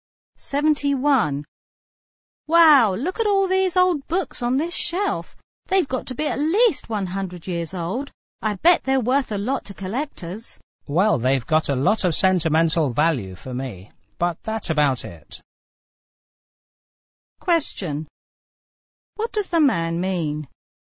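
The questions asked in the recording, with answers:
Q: What does the man mean?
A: The books are not valuable except sentimentally to him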